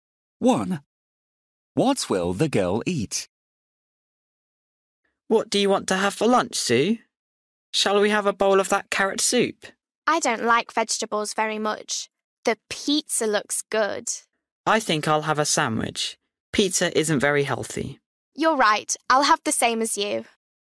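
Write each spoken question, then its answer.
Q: What will the girl eat?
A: a sandwich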